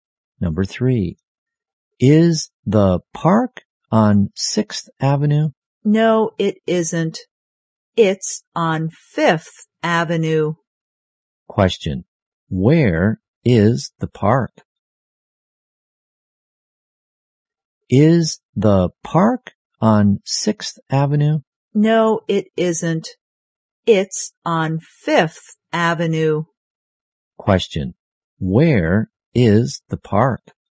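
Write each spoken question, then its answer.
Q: Question, where is the park?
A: On 5th Avenue.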